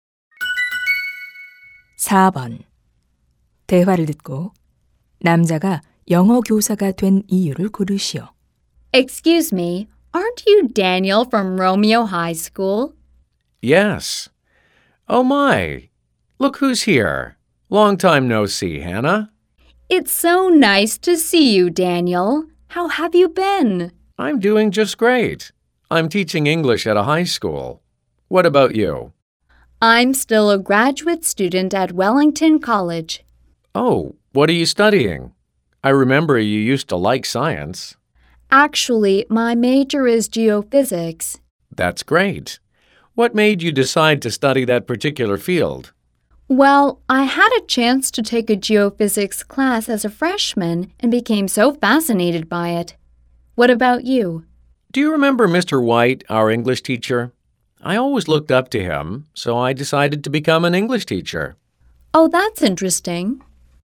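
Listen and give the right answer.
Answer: 영어 선생님 White 선생님을 존경해서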